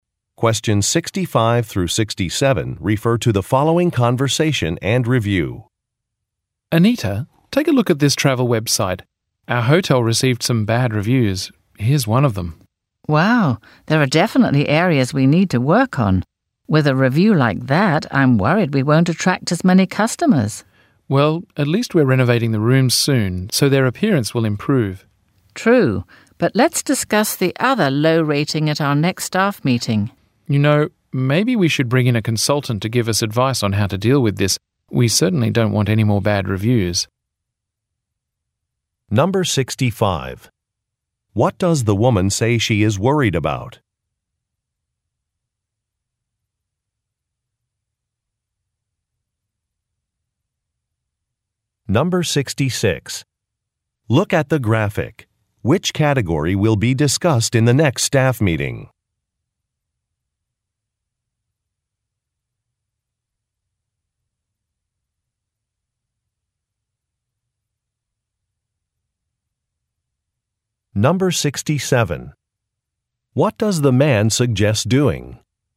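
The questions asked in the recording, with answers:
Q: What does the woman say she is worried about?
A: Not attracting as many customers because of the bad review

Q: What does the man suggest doing?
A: Bringing in a consultant for advice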